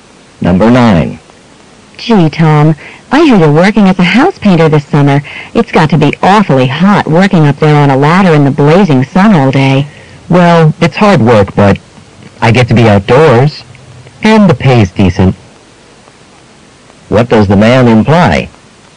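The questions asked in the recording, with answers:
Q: What does the man imply?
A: He likes the job despite the hard work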